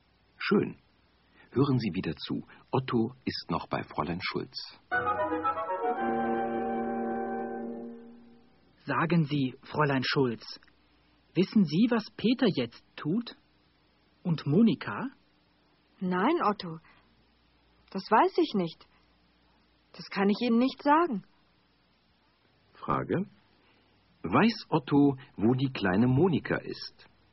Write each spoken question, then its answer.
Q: Weiß Otto, wo die kleine Monika ist?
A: Nein, er weiß nicht, wo Monika ist.